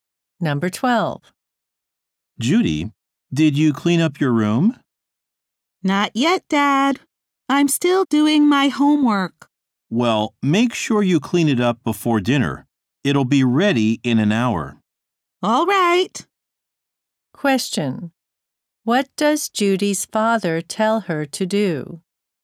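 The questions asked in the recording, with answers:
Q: What does Judy's father tell her to do?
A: Clean up her room before dinner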